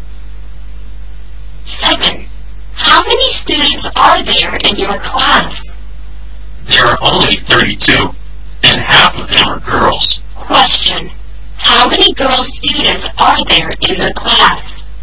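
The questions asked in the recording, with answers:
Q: Question, how many girl students are there in the class?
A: 16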